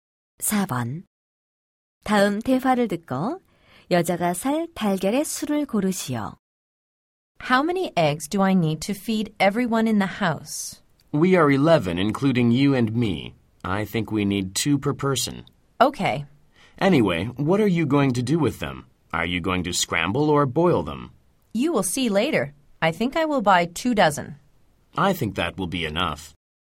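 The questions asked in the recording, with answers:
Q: 다음 대화를 듣고 여자가 살 달걀의 수를 고르시오.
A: 24개 (2 dozen)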